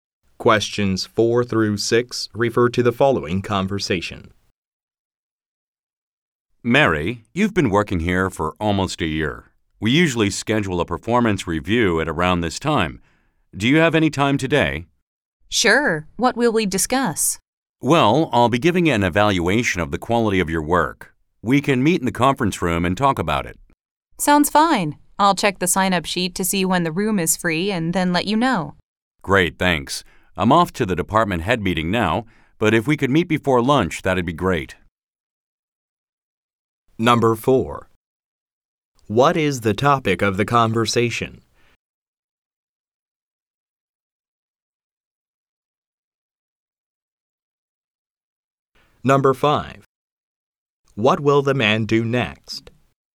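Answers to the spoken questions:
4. A performance review
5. Go to the department head meeting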